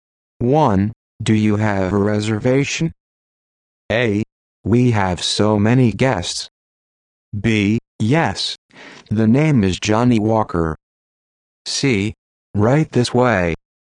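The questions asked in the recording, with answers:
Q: Do you have a reservation?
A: B: Yes. The name is Johnny Walker.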